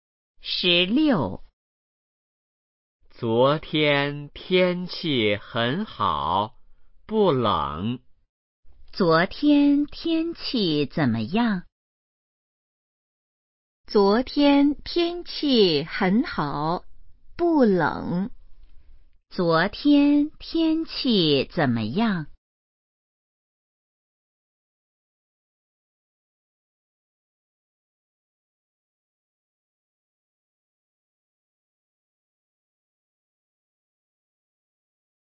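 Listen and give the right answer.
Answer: 很好,不冷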